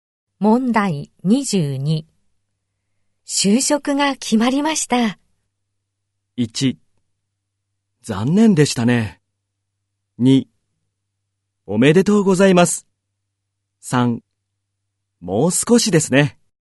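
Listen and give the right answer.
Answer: 2: おめでとうございます。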